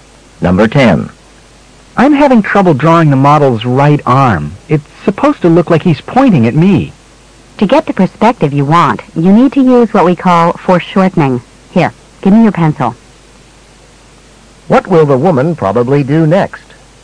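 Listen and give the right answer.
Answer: Show him how to draw the arm using foreshortening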